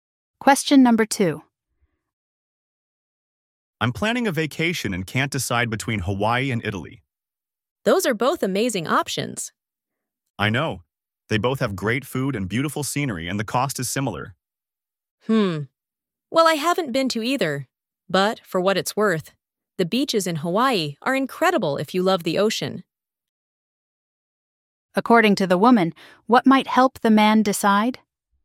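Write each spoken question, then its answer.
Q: According to the woman, what might help the man decide?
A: Whether he loves the ocean (Hawaii's beaches)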